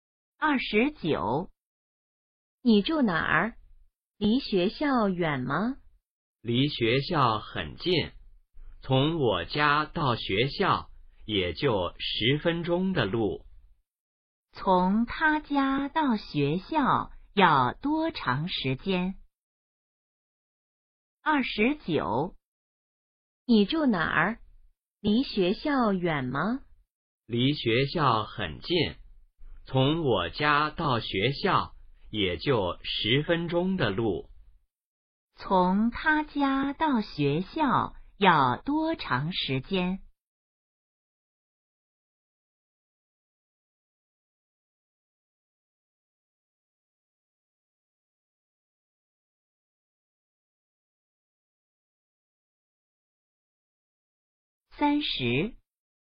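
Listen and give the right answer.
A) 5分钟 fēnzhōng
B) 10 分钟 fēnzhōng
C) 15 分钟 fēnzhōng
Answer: B) 10 分钟 fēnzhōng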